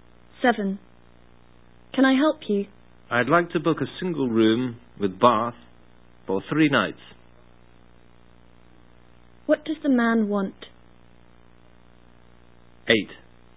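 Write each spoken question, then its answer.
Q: What does the man want?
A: To book a single room with bath for 3 nights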